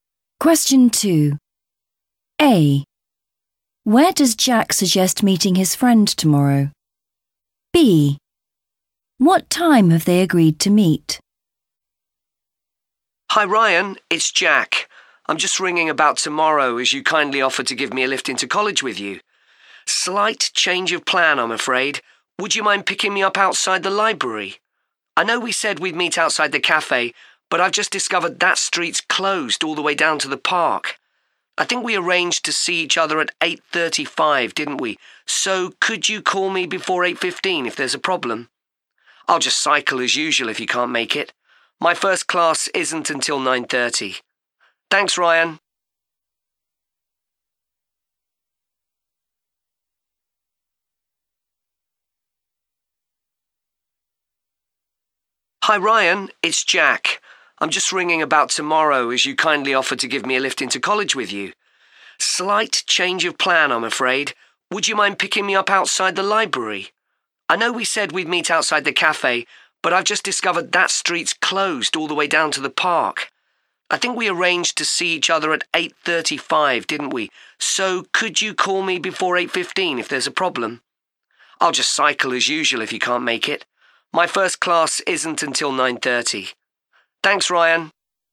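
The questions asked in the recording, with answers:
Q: Where does Jack suggest meeting his friend tomorrow?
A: outside the library

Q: What time have they agreed to meet?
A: 8:35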